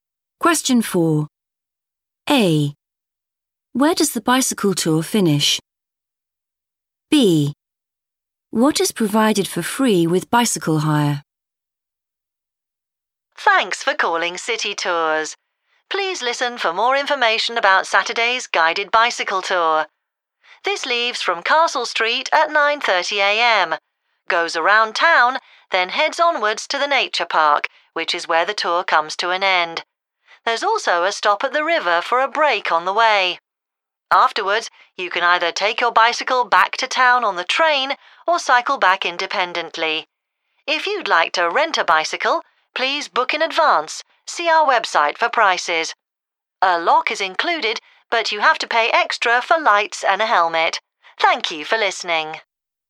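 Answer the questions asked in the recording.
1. the Nature Park
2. a lock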